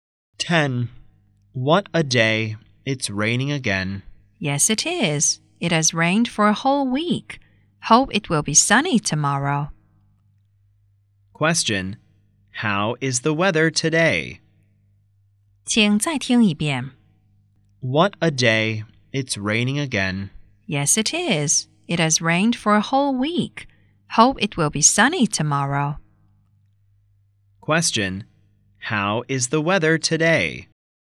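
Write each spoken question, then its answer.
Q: how is the weather today?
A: Rainy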